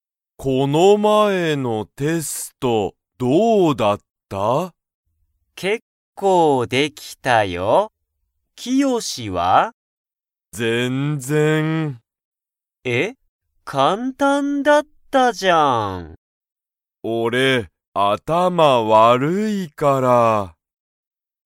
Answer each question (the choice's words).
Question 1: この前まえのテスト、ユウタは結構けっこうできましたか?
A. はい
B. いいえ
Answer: はい

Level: Level 1